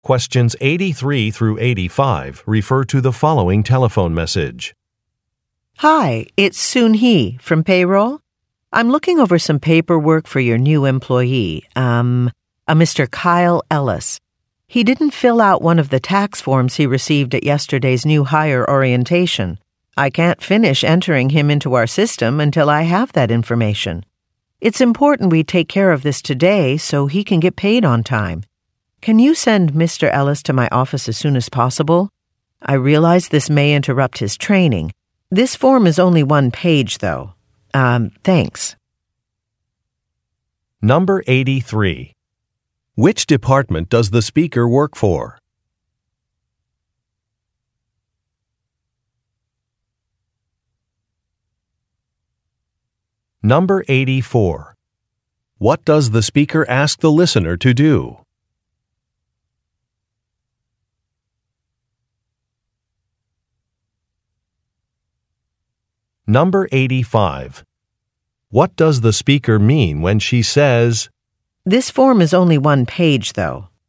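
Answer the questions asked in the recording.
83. Payroll
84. Send Mr. Ellis to her office as soon as possible
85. Filling out the form won't take long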